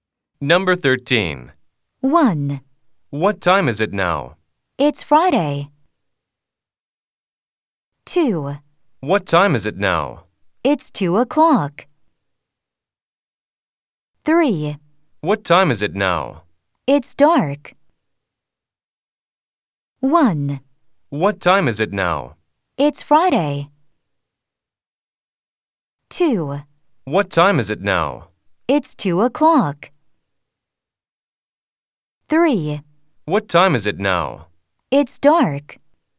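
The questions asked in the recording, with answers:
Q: 다음을 듣고 가장 자연스러운 대화를 고르세요.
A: 2: It's 2 o'clock.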